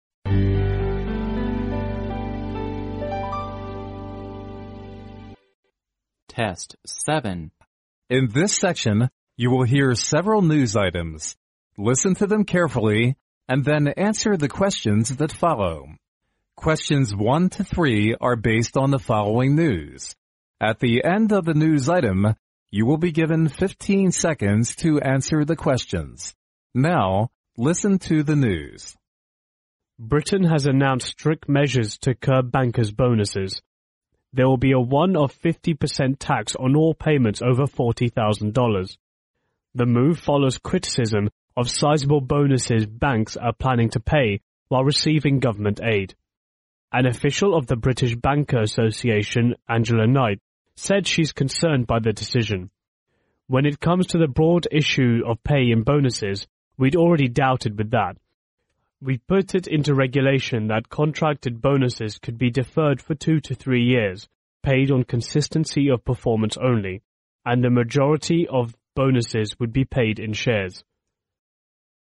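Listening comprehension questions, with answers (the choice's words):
Now listen to the news.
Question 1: What is mainly talked about in the news item?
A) Britain has decided to restrict bankers' bonuses.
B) Britain has decided to raise bankers' salary.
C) Britain has decided to curb bankers' salary.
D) Britain has decided to raise bankers' bonuses.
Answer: Britain has decided to restrict bankers' bonuses.

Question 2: Tax will be levied on those employees whose payments was___.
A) over $4,000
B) $40,000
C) over $40,000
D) $4,000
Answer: over $40,000

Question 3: Which statement is CORRECT about the bankers,bonus?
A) Most of it would be paid in money.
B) Most of it would be paid in shares.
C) Some of it would be paid in shares.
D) Some of it would be paid in money.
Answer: Most of it would be paid in shares.

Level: 专业四级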